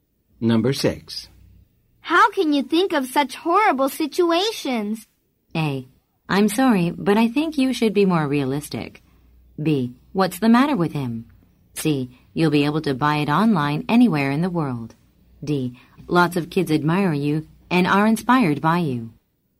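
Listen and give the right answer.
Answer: A: I'm sorry, but I think you should be more realistic.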